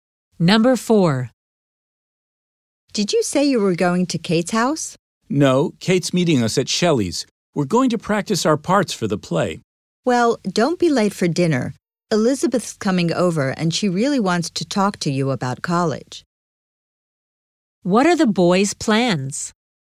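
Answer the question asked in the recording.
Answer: To meet Kate at Shelley's house to practice for the play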